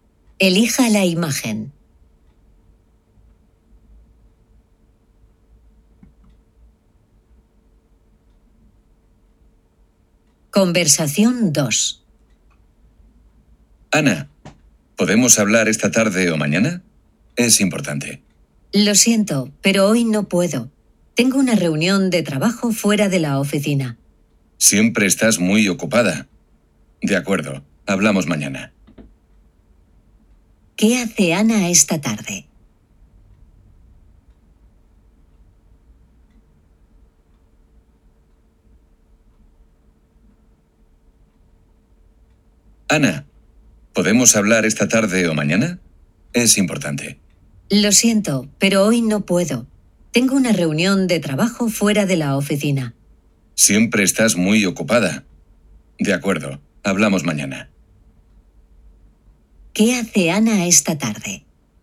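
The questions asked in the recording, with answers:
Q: ¿Qué hace Ana esta tarde?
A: Tiene una reunión de trabajo fuera de la oficina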